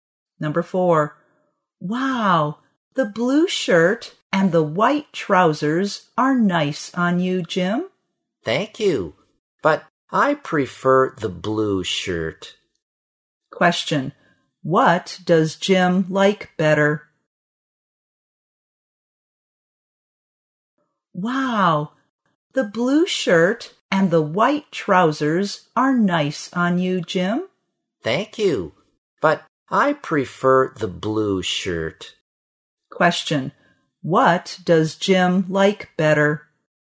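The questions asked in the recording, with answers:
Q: what does Jim like better?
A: The blue shirt.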